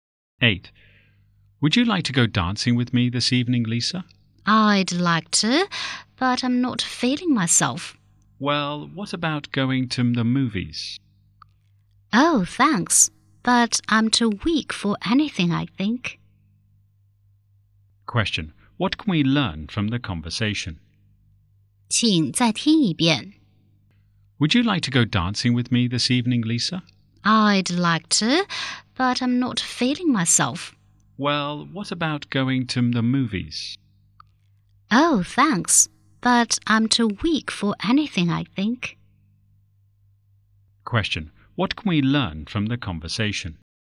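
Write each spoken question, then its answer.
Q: What can we learn from the conversation?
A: Lisa is not feeling well, so she won't go out.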